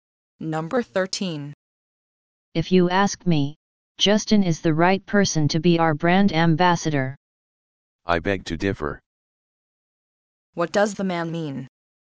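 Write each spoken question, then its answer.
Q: What does the man mean?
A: He disagrees that Justin is the right brand ambassador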